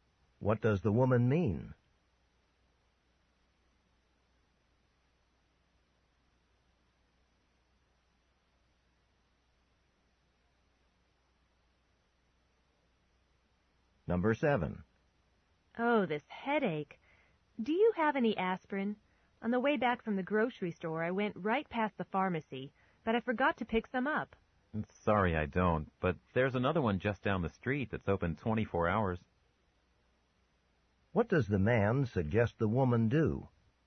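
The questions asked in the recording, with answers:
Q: What does the man suggest the woman do?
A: Go to the 24-hour pharmacy down the street.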